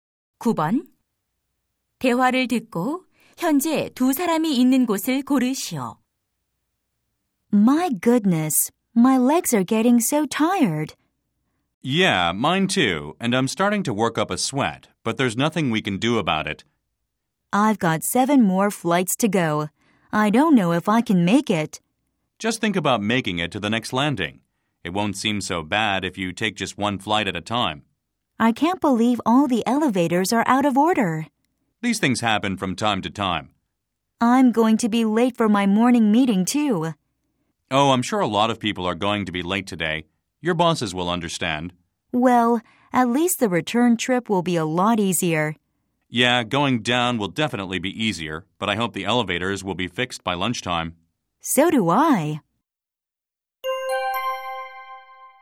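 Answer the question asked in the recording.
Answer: 건물 계단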